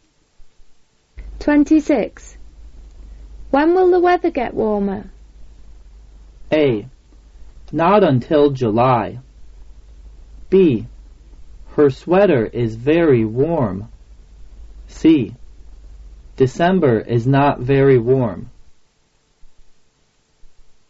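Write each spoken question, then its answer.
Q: When will the weather get warmer?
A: A: Not until July.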